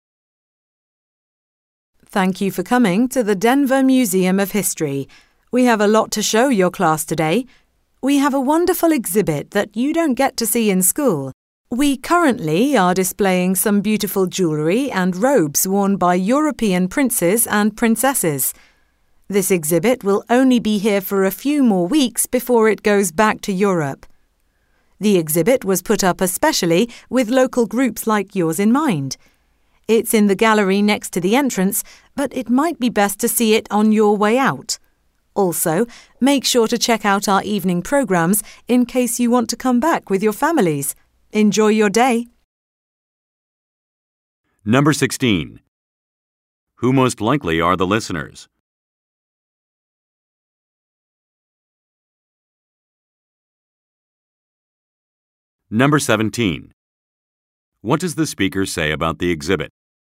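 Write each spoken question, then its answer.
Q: Who most likely are the listeners?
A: A school class (students)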